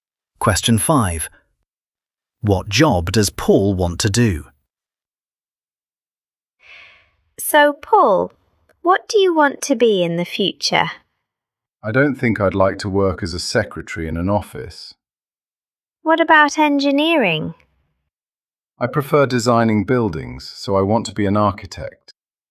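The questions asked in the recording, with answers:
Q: What job does Paul want to do?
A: architect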